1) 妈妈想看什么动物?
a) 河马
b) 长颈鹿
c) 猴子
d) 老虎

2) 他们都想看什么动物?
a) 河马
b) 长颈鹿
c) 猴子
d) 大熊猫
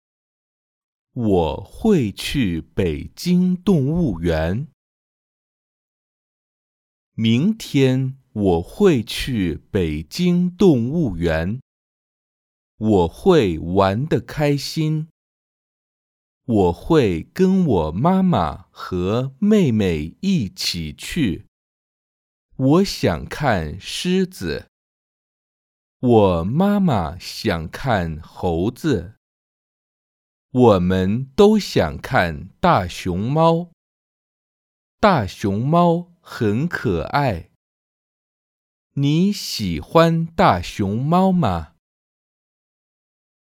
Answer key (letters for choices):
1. c
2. d

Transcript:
我会跟我妈妈和妹妹一起去。 我想看狮子,我妈妈想看猴子。我们都想看大熊猫。大熊猫很可爱! 你喜欢大熊猫吗?

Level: beginners